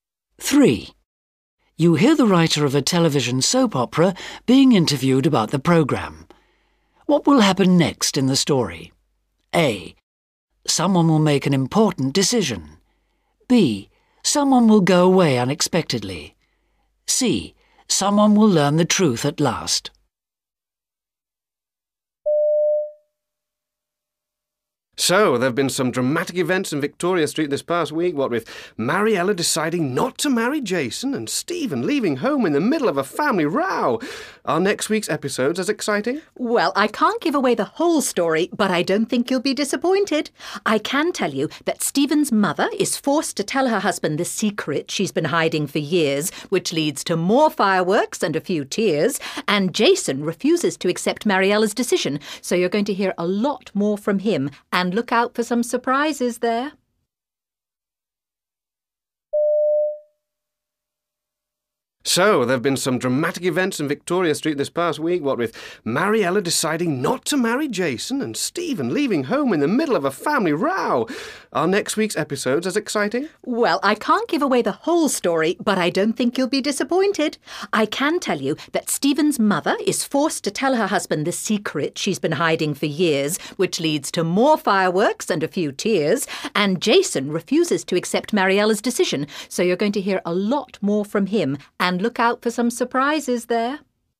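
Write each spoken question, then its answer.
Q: What will happen next in the story?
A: C: Someone will learn the truth at last.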